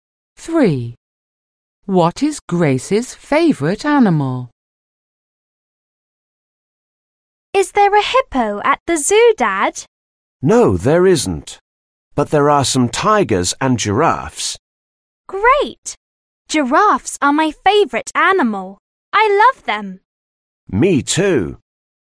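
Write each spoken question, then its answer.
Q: What is Grace's favourite animal?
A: Giraffes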